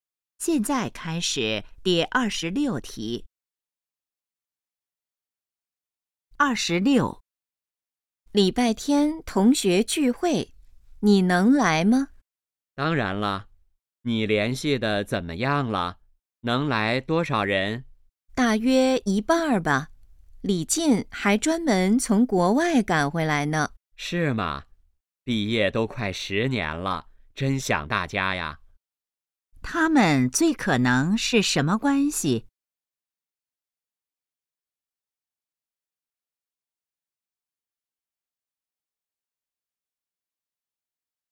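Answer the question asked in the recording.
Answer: 同学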